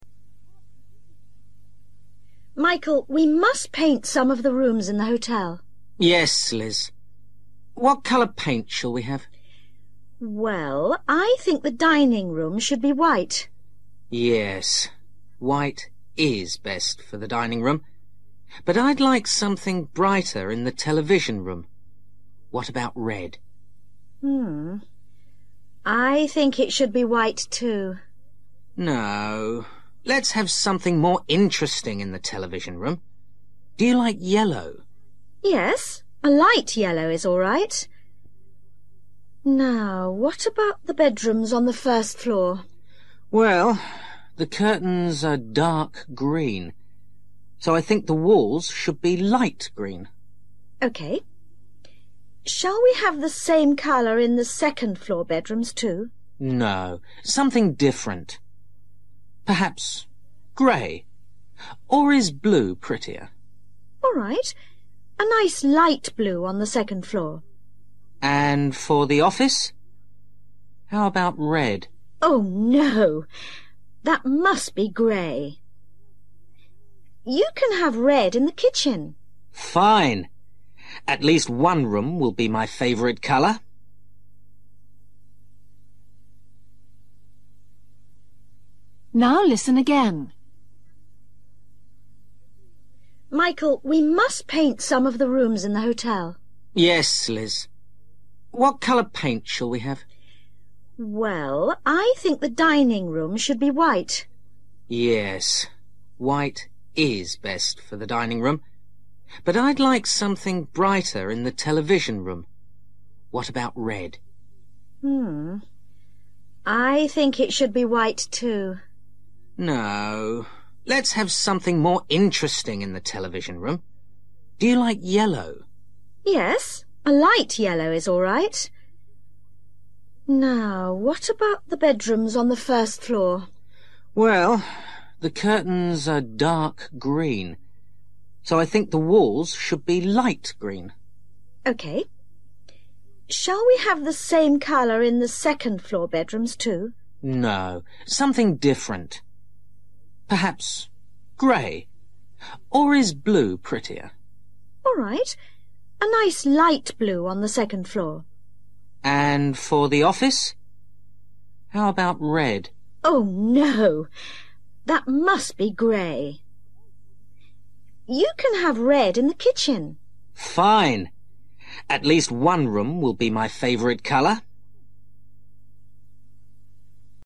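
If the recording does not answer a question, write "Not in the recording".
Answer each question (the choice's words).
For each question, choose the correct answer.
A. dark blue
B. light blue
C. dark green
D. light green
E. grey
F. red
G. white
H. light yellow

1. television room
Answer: light yellow

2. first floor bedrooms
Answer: light green

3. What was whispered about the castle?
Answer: Not in the recording

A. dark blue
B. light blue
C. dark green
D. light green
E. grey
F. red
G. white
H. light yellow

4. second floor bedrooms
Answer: light blue

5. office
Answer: grey

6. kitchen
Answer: red

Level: Luyện nghe trình độ A2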